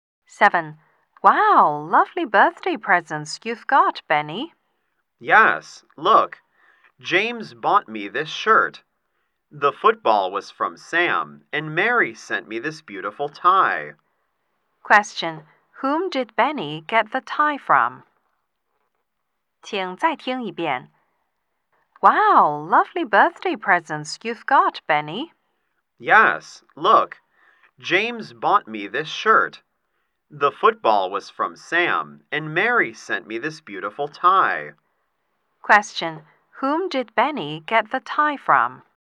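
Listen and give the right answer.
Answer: Mary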